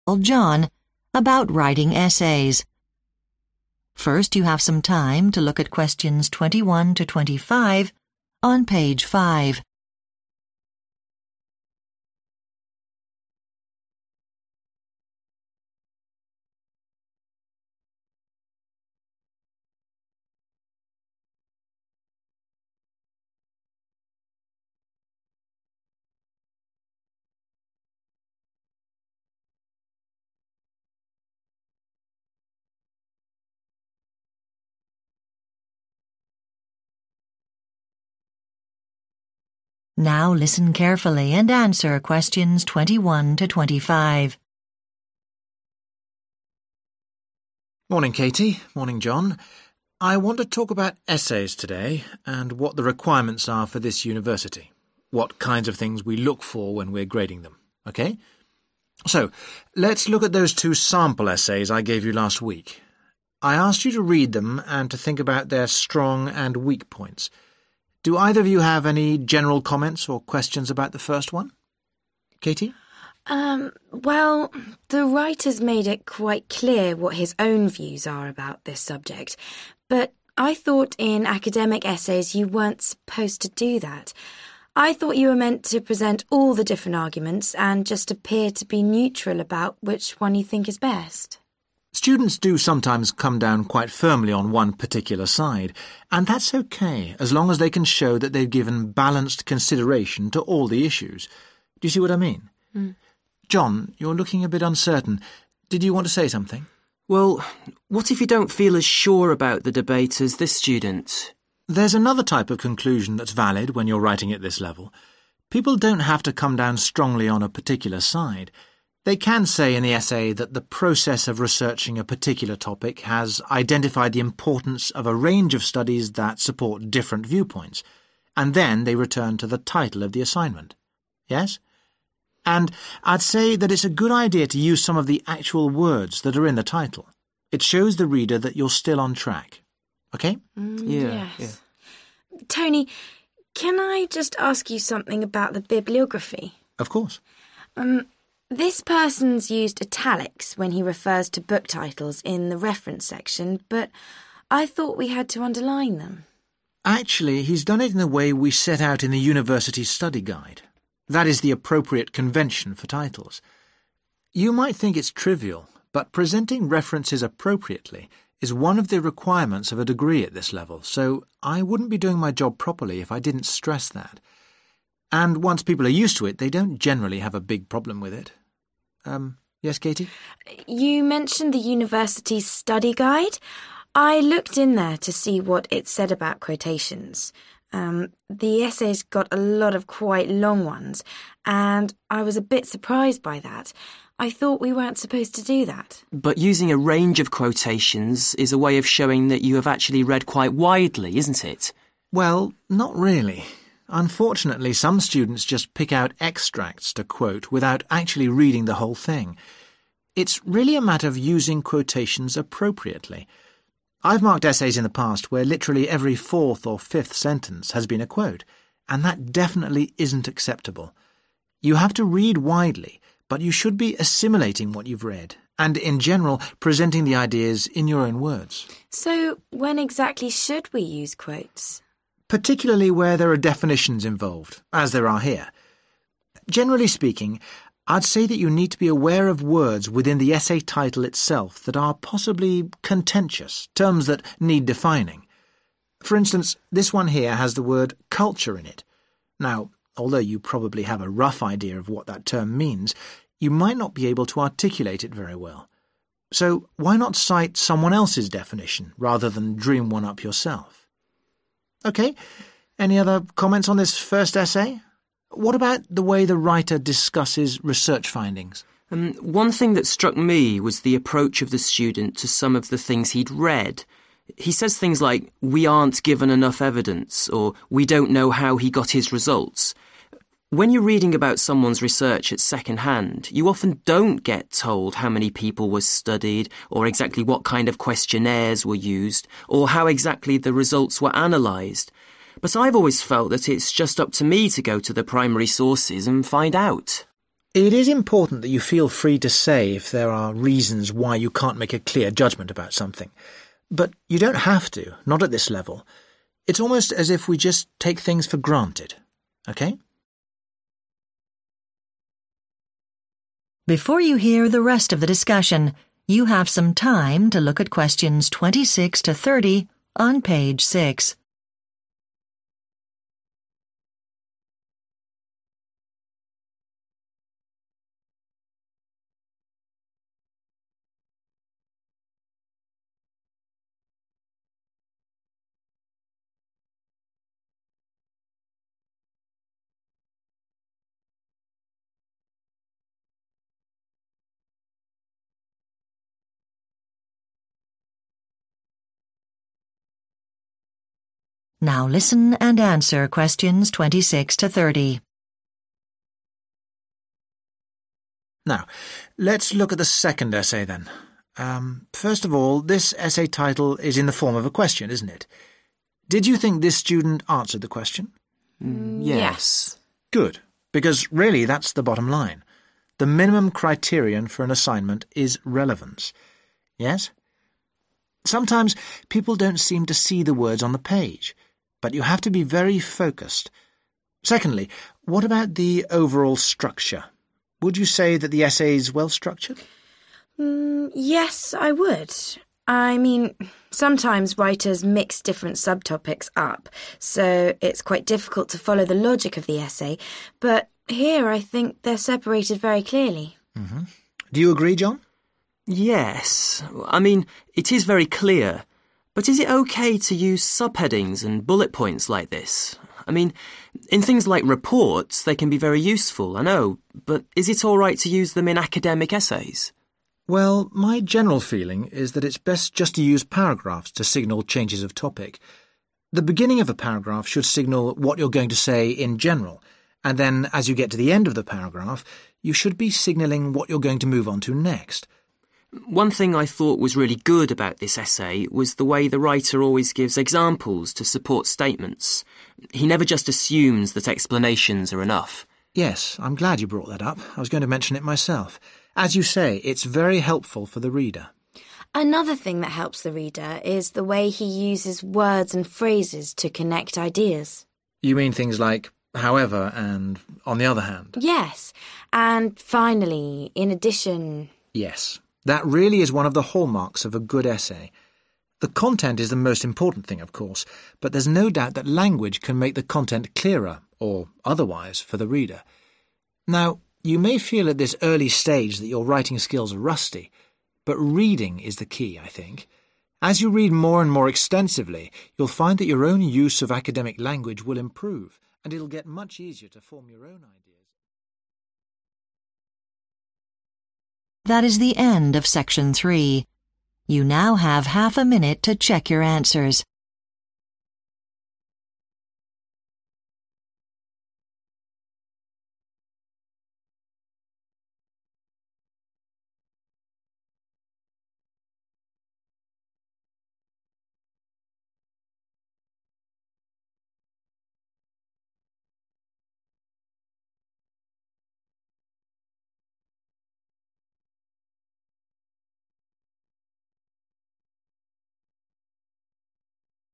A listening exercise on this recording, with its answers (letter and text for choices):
Choose the correct answer, A, B or C.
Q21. Katy thinks it might be inappropriate for academic essays to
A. give both sides of an argument.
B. express personal opinions.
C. present a range of views.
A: B. express personal opinions.

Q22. The tutor says that in one type of conclusion students should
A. withhold their own views.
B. avoid too much repetition.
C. refer to the title.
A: C. refer to the title.

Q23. What does the tutor say about the bibliography?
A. There is a standard format for references.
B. Presentation is not assessed at this level.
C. Book titles should be underlined.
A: A. There is a standard format for references.

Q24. What advice does the tutor give about quotations?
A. They provide evidence of how widely a student has read.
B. They are useful for defining difficult concepts.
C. There is a tendency to use too few of them.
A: B. They are useful for defining difficult concepts.

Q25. John suggests that the writer of the first essay should have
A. done more thorough research.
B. analysed his data more carefully.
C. given his views more clearly.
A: A. done more thorough research.

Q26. The tutor says that the most basic requirement of an essay is relevance. Katy thinks the writer separates different __________ very clearly.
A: subtopics

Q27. John feels that bullet points and sub-headings might be more appropriate for __________ than for essays.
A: reports

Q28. The tutor thinks that paragraphs should be used to structure essays. John particularly admires the way the writer backs up his statements with __________.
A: examples

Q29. Katy likes the writer's use of language to link his __________.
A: ideas

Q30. The tutor thinks that wide __________ helps to develop writing ability.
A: reading